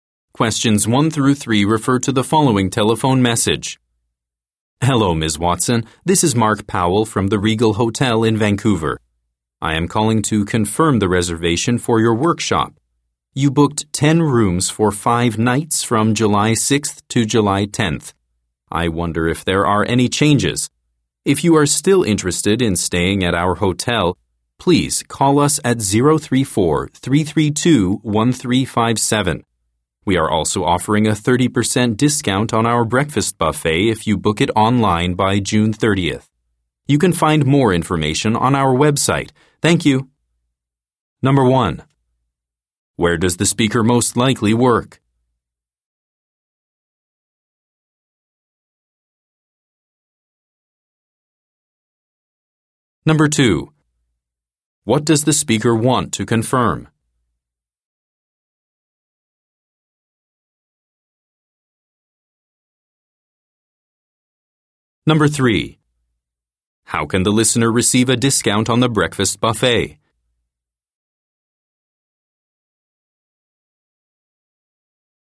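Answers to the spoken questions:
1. At a hotel
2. A reservation for a workshop
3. By booking it online by June 30th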